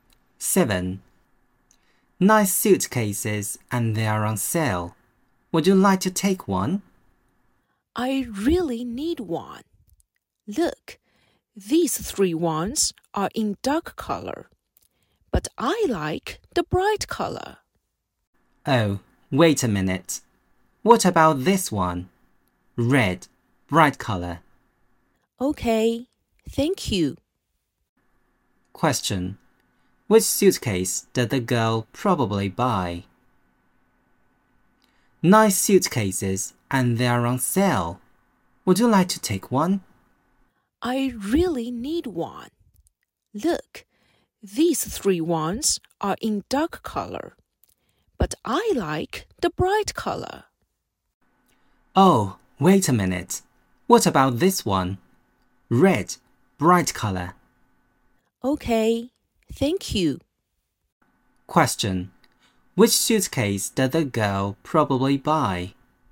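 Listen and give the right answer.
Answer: The red one with a bright color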